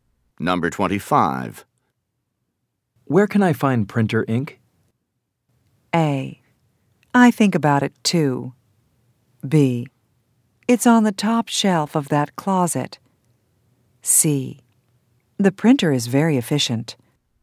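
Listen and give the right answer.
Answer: B: It's on the top shelf of that closet.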